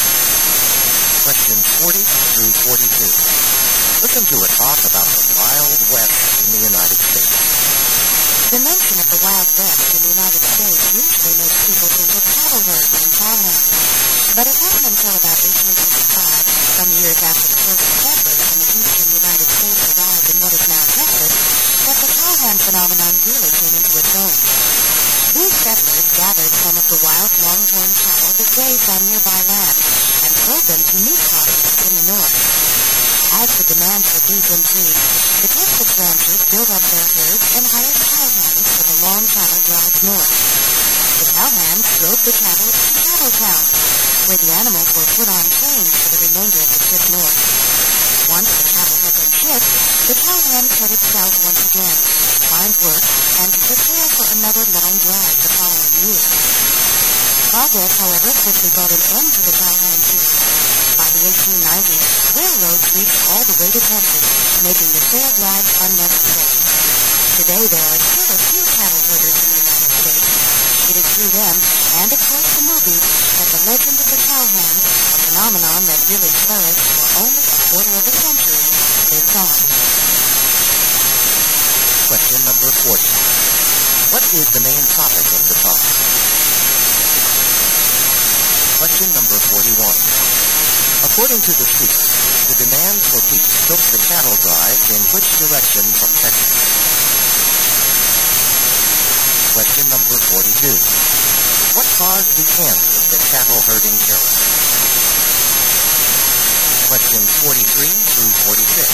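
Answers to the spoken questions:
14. The rise and end of the cowhand and the cattle drives
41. North
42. Railroads reached Texas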